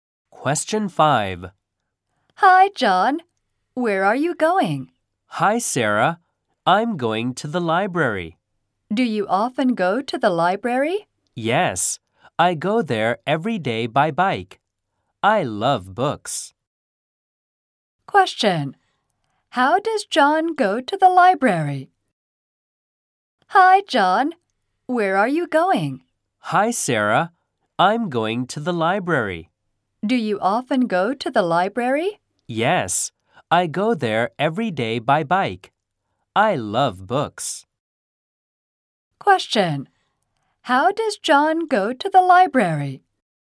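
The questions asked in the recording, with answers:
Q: How does John go to the library?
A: By bike.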